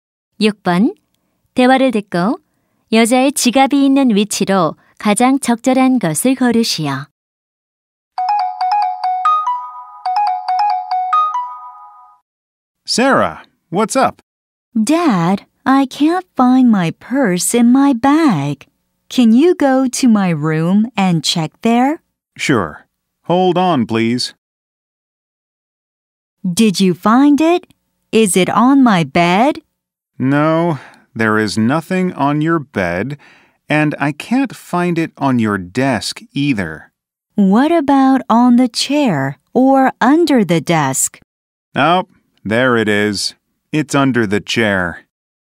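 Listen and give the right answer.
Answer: 의자 아래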